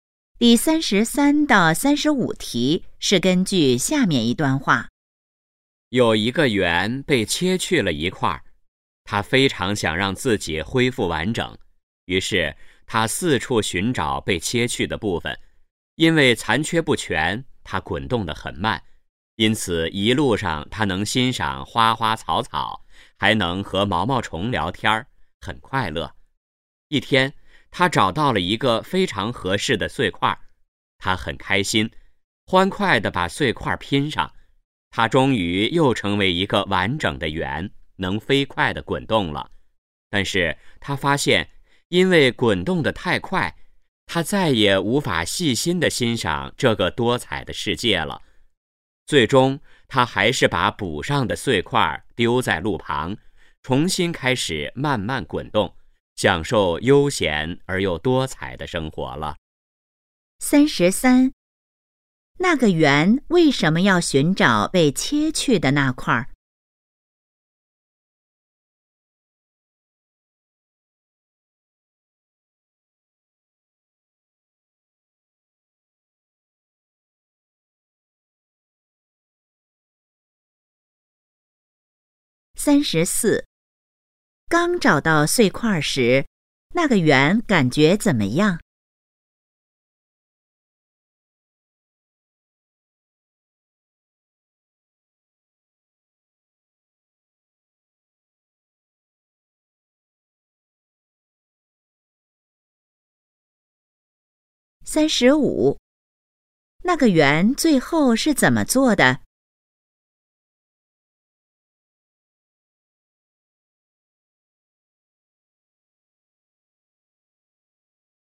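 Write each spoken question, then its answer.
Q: 那个圆为什么要寻找被切去的那块?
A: 想恢复完整

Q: 刚找到碎块时,那个圆感觉怎么样?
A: 很开心

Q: 那个圆最后是怎么做的?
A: 把碎块丢在路旁,重新慢慢滚动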